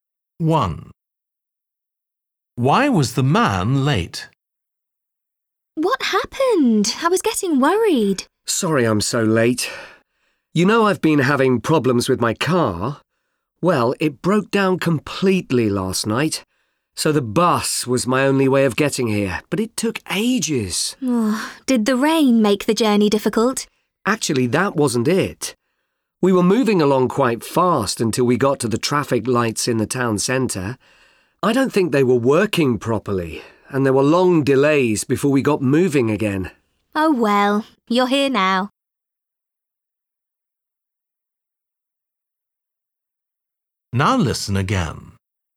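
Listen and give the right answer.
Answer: The traffic lights in the town centre weren't working, causing long delays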